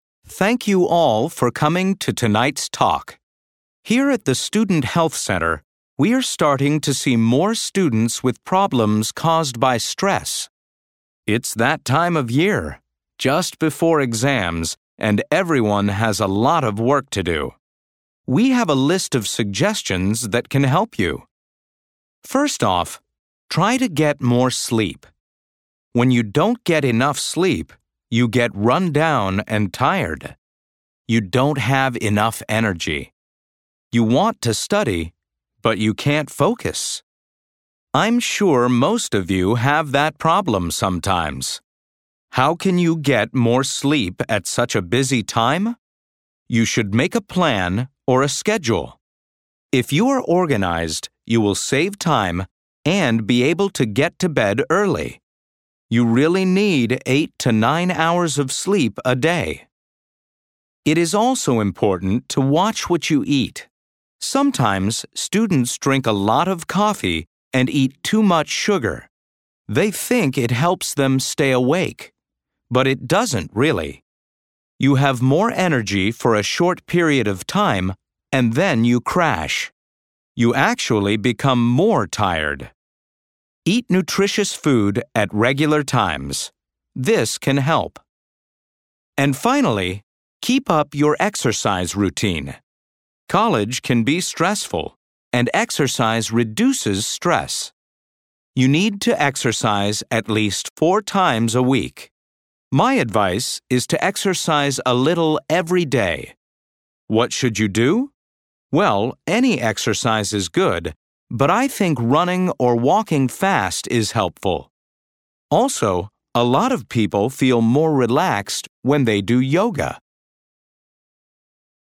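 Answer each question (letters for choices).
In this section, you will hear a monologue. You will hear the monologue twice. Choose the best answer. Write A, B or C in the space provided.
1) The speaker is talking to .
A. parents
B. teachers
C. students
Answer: C

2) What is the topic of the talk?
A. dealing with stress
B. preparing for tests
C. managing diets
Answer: A

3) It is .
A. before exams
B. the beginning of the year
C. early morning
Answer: A

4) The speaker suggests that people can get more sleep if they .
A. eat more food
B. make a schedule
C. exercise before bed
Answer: B

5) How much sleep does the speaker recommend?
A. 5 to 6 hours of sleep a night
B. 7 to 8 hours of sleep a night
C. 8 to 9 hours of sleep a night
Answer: C

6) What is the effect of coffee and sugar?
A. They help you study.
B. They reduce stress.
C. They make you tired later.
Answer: C

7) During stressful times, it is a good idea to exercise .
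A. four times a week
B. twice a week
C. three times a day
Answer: A

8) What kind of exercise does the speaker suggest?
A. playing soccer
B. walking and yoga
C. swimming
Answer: B

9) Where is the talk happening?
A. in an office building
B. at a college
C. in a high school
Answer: B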